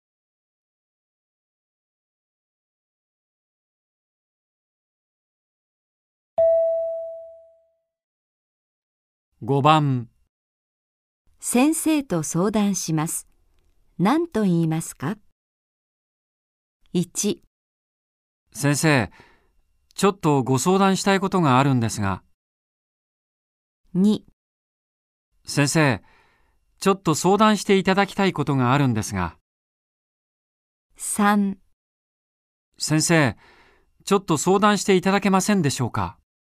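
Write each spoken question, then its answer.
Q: 先生と相談します。何と言いますか?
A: 1: 先生、ちょっとご相談したいことがあるんですが。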